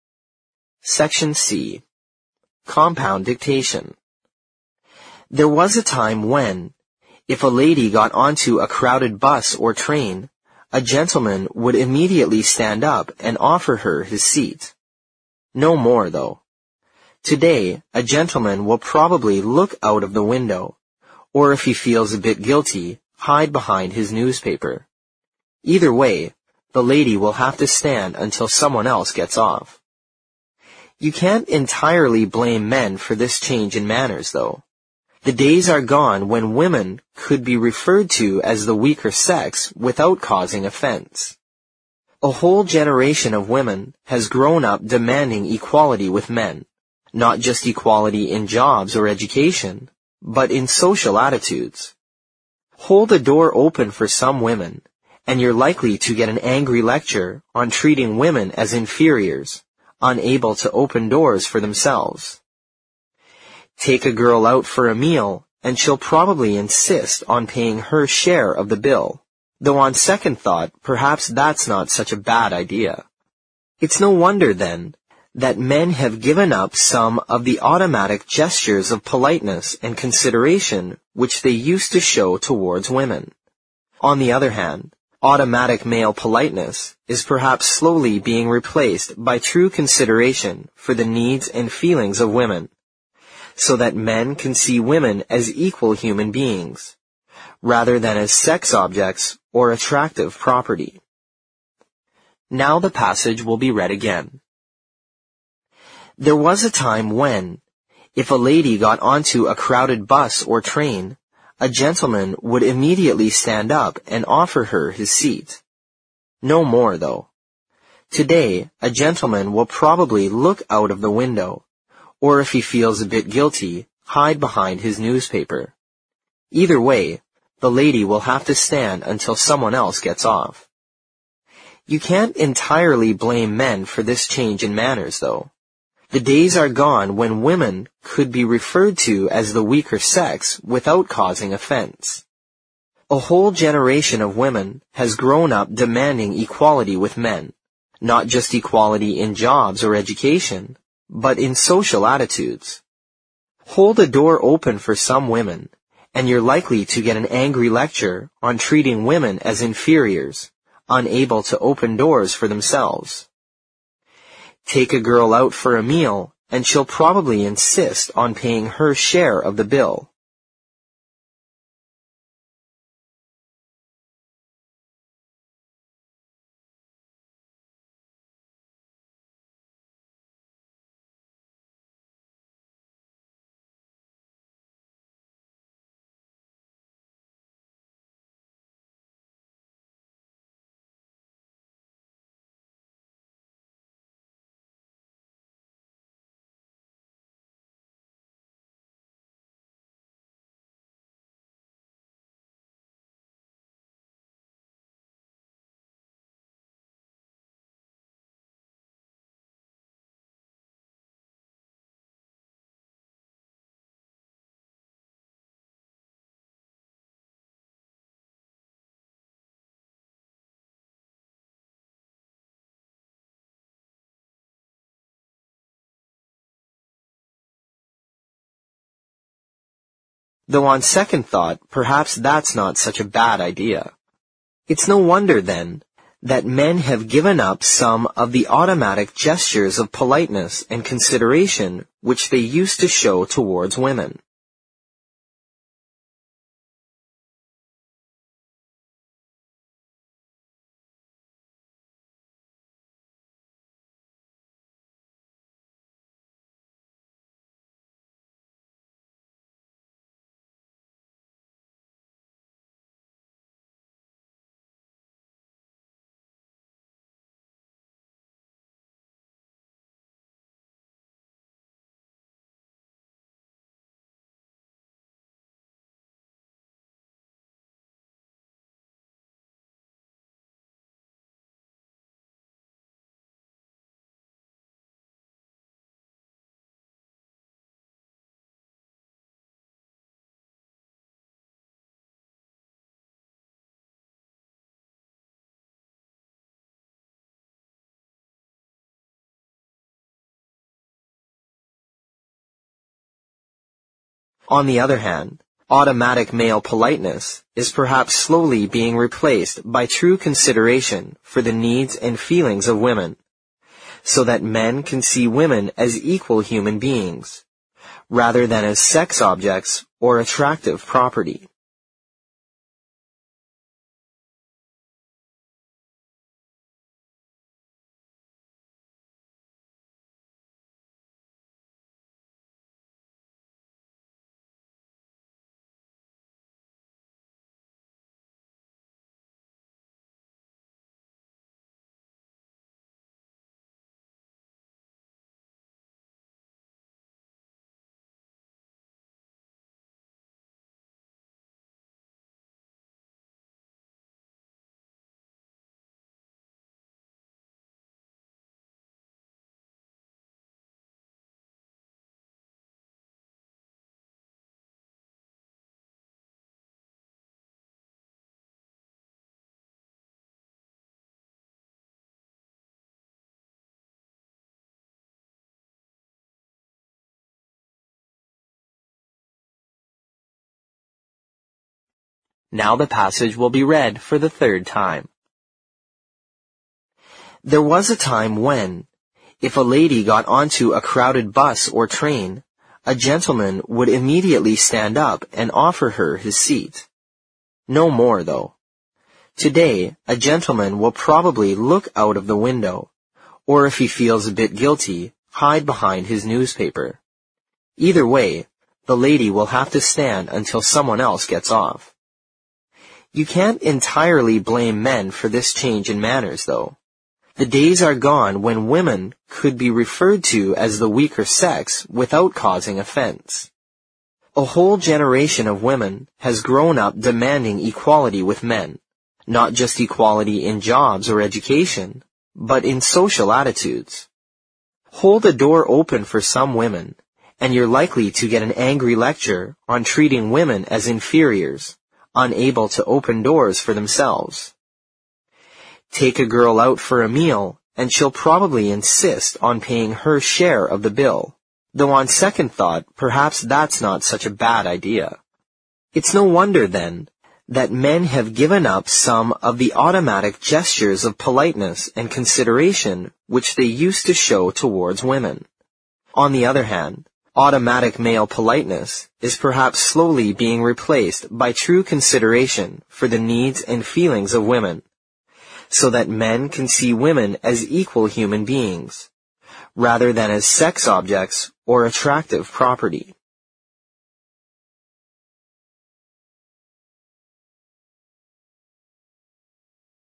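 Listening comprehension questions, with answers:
Section C Compound Dictation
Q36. Today a gentleman will probably look out of the window, or if he feels a bit (36) ______ , hide behind his newspaper.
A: guilty

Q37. You can't (37) ______ blame men for this change in (38) ______ , though.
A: entirely

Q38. You can't (37) ______ blame men for this change in (38) ______ , though.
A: manners

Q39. The days are gone when women could be (39) ______ to as the weaker sex without causing (40) ______ .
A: referred

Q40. The days are gone when women could be (39) ______ to as the weaker sex without causing (40) ______ .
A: offense

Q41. A whole generation of women has grown up (41) ______ equality with men; not just equality in jobs or education, but in (42) ______ attitudes.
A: demanding

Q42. A whole generation of women has grown up (41) ______ equality with men; not just equality in jobs or education, but in (42) ______ attitudes.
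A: social

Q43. Hold a door open for some women and you're likely to get an angry lecture on treating women as (43) ______ , unable to open doors for themselves.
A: inferiors

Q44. (44) _________________________________________________ , though on second thought perhaps that's not such a bad idea.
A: Take a girl out for a meal, and she'll probably insist on paying her share of the bill

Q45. It's no wonder, then, that men have (45) _______________________________________________________ .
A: given up some of the automatic gestures of politeness and consideration which they used to show towards women

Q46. On the other hand, automatic male politeness is perhaps slowly being replaced by true consideration for the needs and feelings of women, so that (46) __________________________________________________________ .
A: men can see women as equal human beings, rather than as sex objects or attractive property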